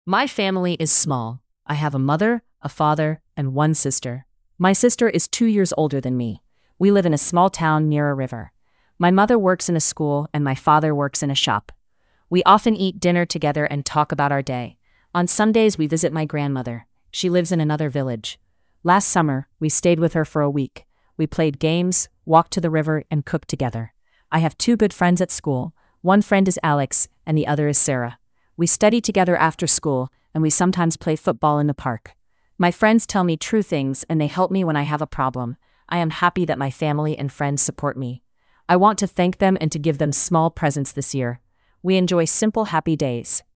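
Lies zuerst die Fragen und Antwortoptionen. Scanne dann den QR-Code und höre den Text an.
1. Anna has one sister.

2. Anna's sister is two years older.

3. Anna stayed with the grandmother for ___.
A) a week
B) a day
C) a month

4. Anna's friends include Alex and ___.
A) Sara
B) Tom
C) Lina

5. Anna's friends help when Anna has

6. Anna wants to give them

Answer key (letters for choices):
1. True
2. True
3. A
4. A
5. a problem
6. small presents

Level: Grade 6 medium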